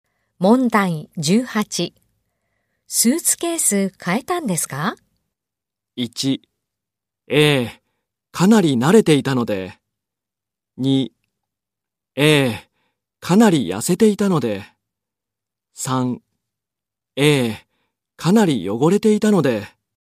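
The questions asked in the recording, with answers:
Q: スーツケース変えたんですか?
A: 3: ええ、かなり汚れていたので。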